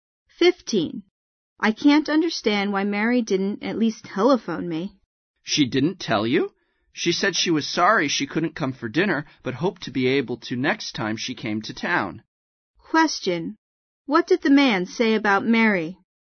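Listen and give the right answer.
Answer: She was sorry she couldn't come for dinner and hoped to come next time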